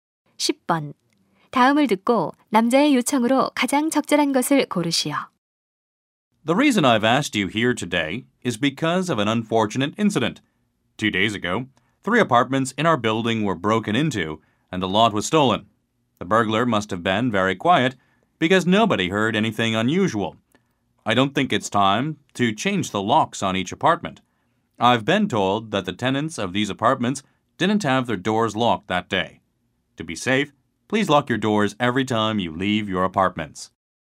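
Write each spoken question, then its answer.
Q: 다음을 듣고 남자의 요청으로 가장 적절한 것을 고르시오.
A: 외출할 때마다 문을 잠글 것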